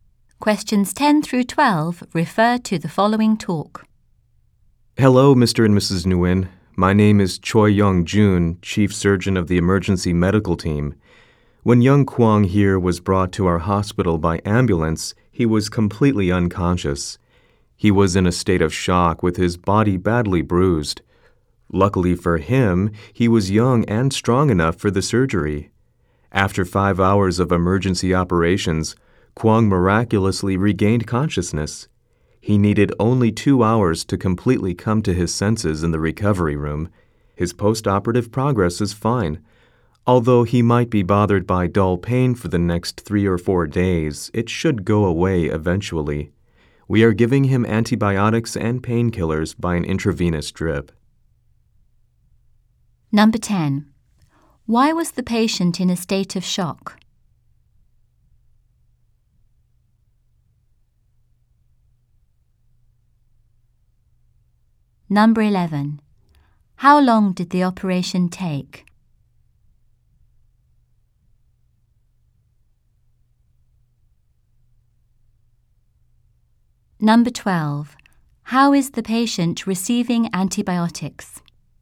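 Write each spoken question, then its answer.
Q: How long did the operation take?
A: 5 hours

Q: How is the patient receiving antibiotics?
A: By an intravenous drip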